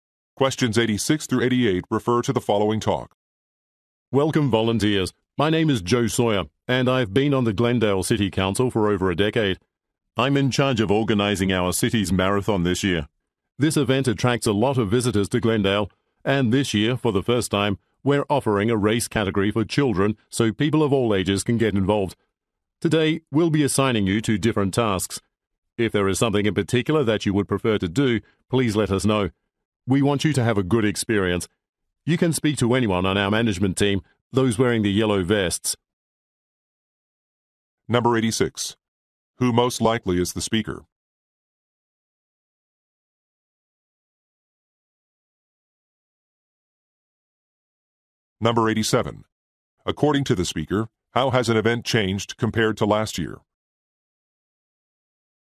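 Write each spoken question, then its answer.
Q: Who most likely is the speaker?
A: A city council member

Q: According to the speaker, how has an event changed compared to last year?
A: A race category for children was added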